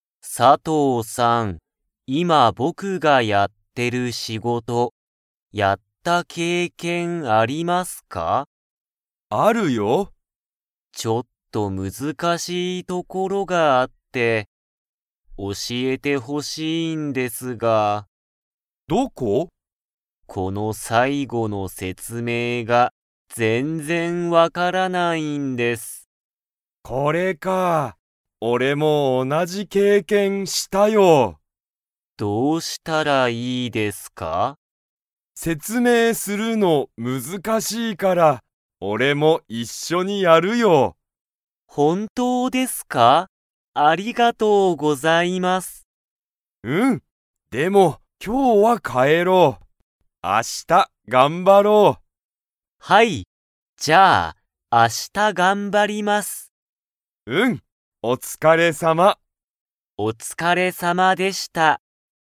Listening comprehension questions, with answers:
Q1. 佐藤(さとう)さんは、田村たむらさんの仕事(しごと)をやった経験(けいけん)がありますか?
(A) はい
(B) いいえ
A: はい

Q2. 田村(たむら)さんは、____その仕事(しごと)を頑張(がんば)る。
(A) 今日(きょう)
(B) 一人(ひとり)で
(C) 後(あと)で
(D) 明日(あした)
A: 明日(あした)

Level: Level 2

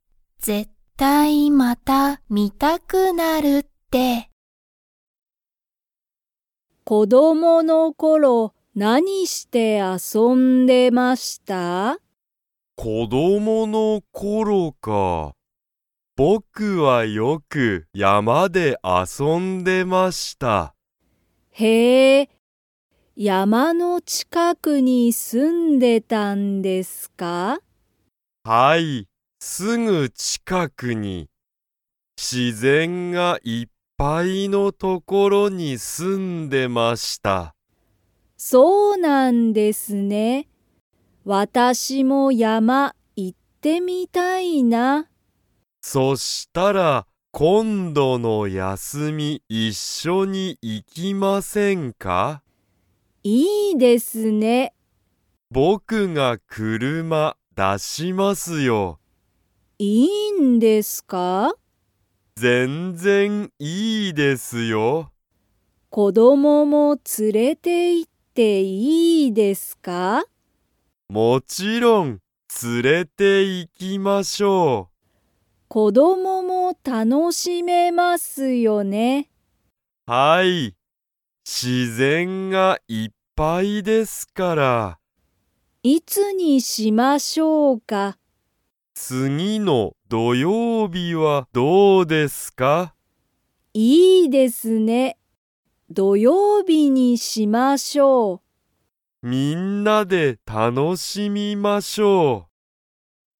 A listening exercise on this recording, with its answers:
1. 木下(きのした)さんは、子供(こども)の頃(ころ)、山(やま)の近(ちか)くに住(す)んでいましたか?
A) はい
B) いいえ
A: はい

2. 近藤(こんどう)さんは、____を連(つ)れて行(い)く。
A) 休(やす)み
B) 車(くるま)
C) 子供(こども)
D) 自然(しぜん))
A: 子供(こども)

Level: Level 2

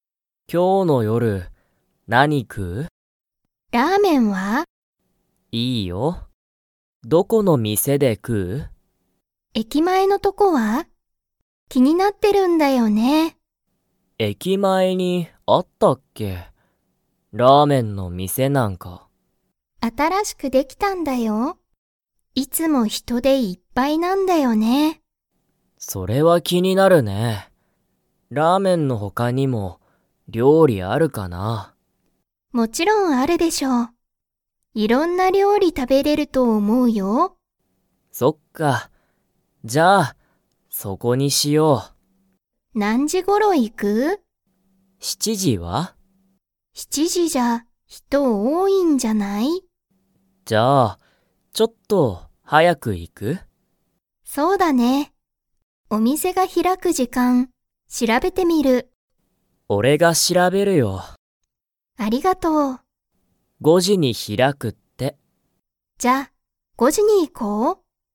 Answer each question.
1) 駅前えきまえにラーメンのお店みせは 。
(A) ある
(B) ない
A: ある

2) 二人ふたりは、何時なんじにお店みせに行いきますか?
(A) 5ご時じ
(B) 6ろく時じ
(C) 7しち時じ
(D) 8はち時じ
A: 5ご時じ

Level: Level 3

